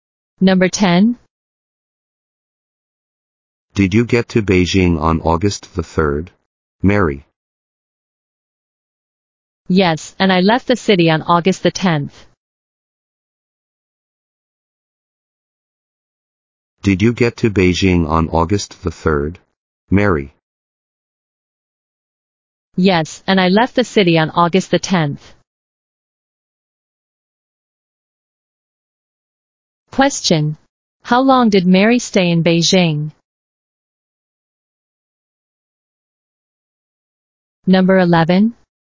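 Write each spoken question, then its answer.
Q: How long did Mary stay in Beijing?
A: About a week (August 3rd to 10th)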